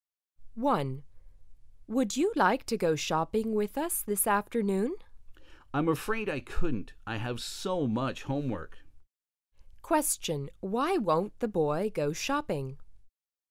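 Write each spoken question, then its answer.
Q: Why won't the boy go shopping?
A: He has so much homework.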